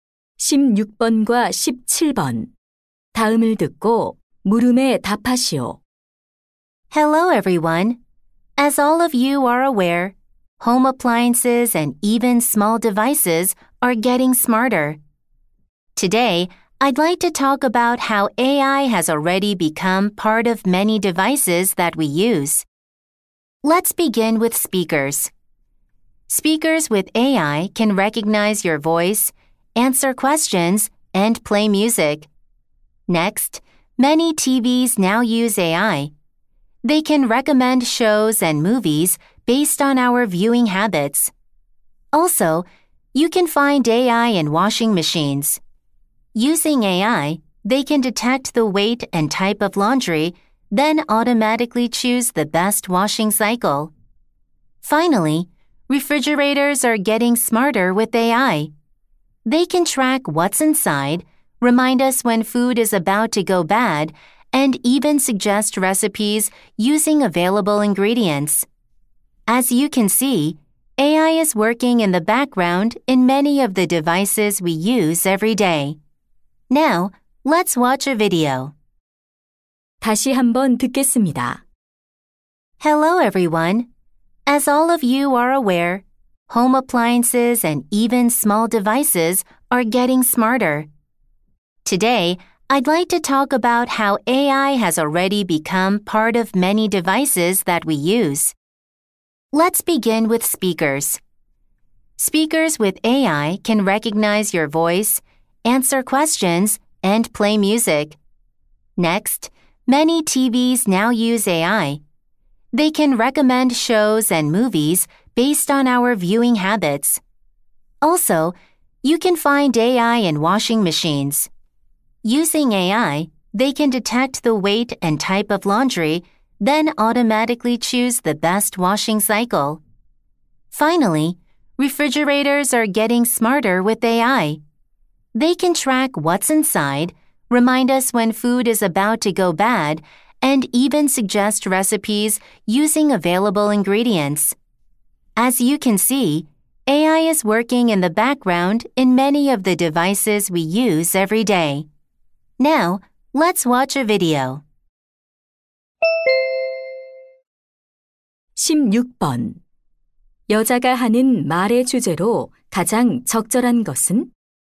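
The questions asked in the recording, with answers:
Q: 여자가 하는 말의 주제로 가장 적절한 것은?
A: 일상 기기에서 AI가 활용되는 방식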